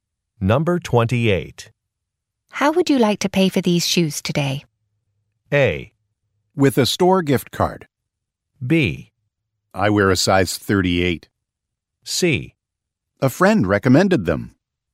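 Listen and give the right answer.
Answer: A: With a store gift card.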